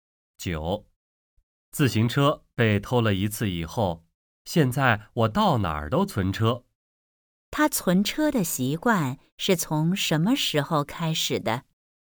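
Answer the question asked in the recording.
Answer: 自行车被偷了一次以后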